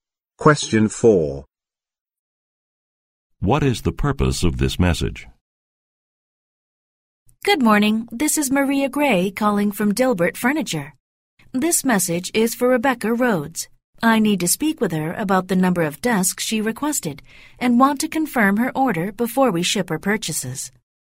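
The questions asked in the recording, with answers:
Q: What is the purpose of this message?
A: To confirm an order of desks before shipping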